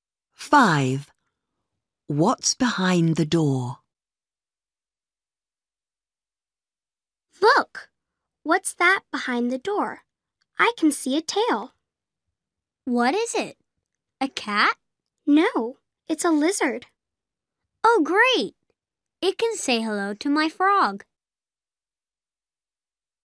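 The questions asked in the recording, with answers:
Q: What's behind the door?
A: A lizard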